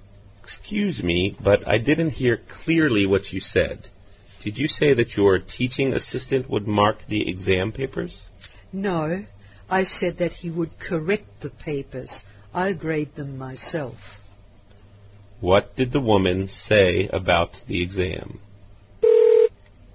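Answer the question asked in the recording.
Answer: The assistant will correct the papers, but she will grade them herself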